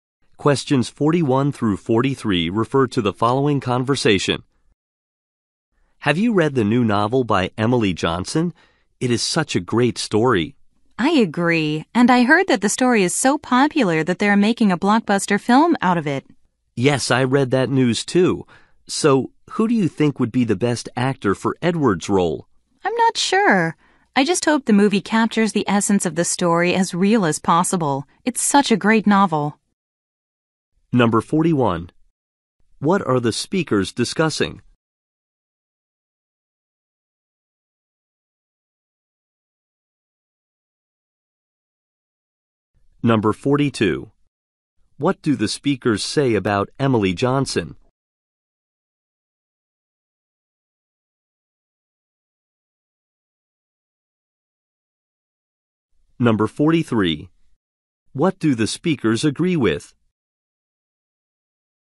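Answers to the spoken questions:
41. A new novel that is being made into a film
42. She wrote a new novel
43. The novel is a great story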